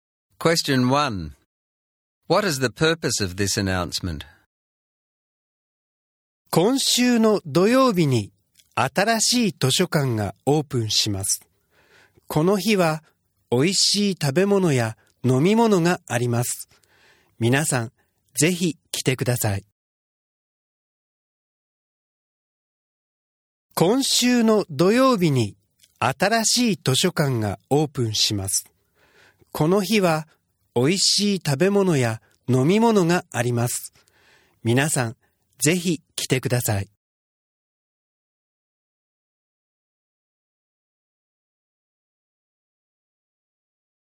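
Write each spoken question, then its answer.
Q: What is the purpose of this announcement?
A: To invite everyone to the opening of the new library this Saturday, where there will be food and drinks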